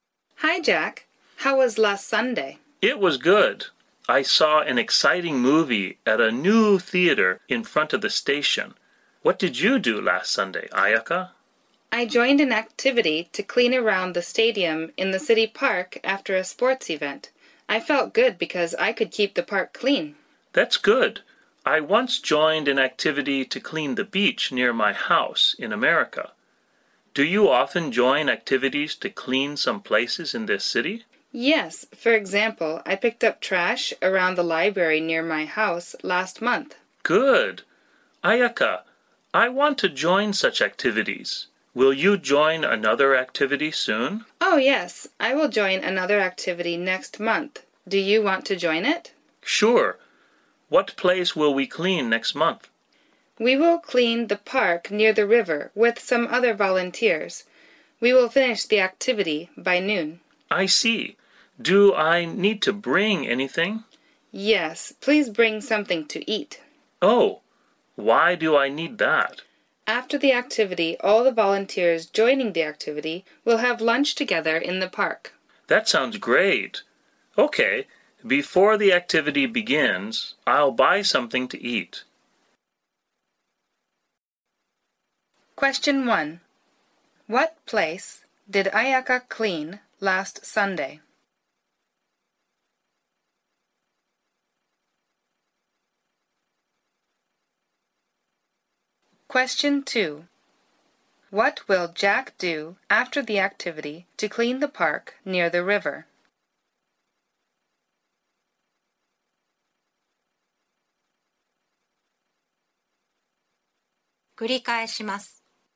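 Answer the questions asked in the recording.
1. Around the stadium in the city park
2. Have lunch together with the volunteers in the park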